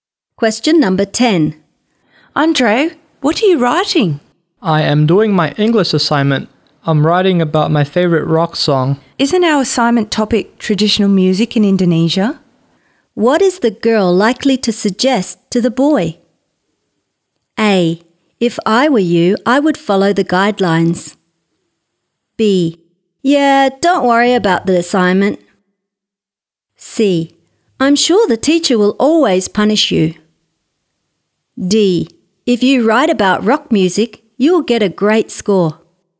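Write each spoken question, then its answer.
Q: What is the girl likely to suggest to the boy?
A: A: If I were you, I would follow the guidelines.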